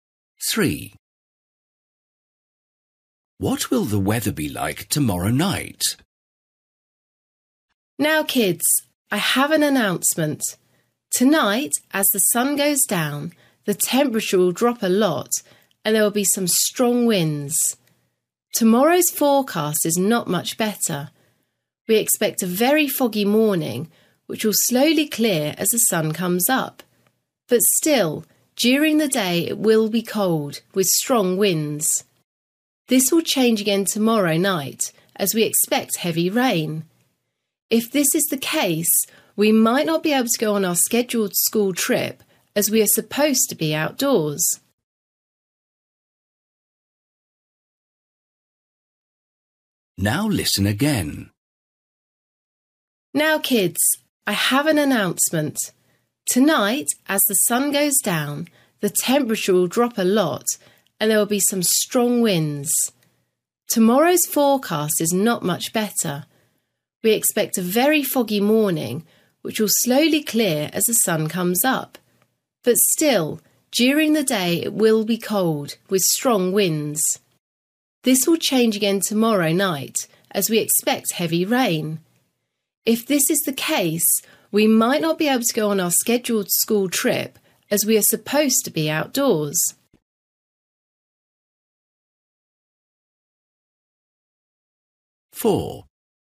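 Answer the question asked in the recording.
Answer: Heavy rain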